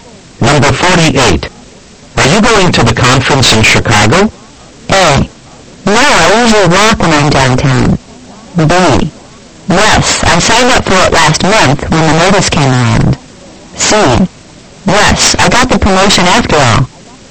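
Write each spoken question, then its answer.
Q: Are you going to the conference in Chicago?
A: B: Yes, I signed up for it last month when the notice came around.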